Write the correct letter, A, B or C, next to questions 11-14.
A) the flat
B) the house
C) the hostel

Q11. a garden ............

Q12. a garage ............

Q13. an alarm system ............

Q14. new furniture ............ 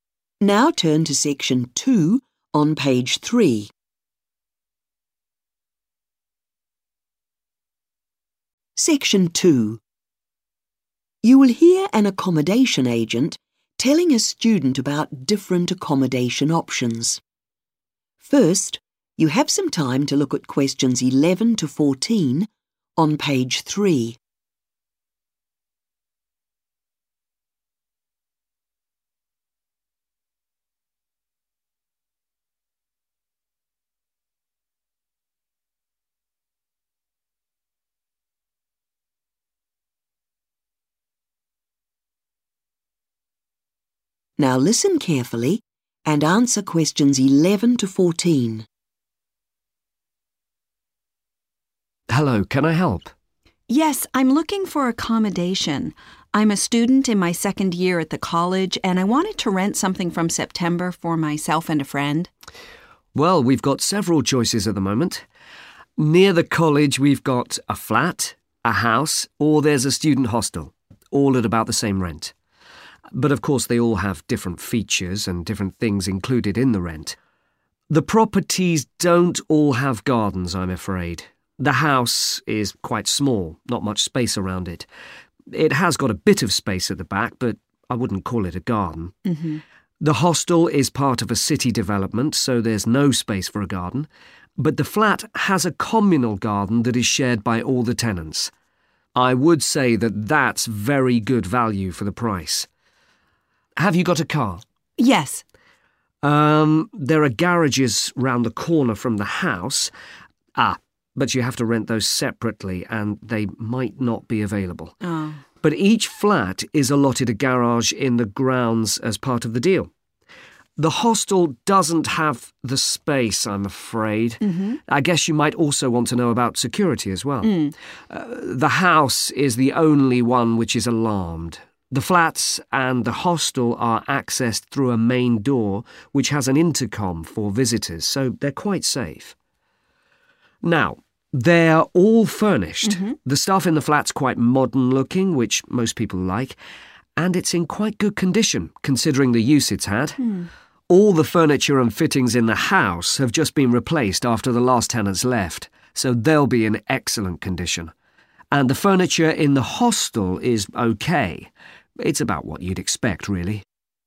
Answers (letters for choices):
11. A
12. A
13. B
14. B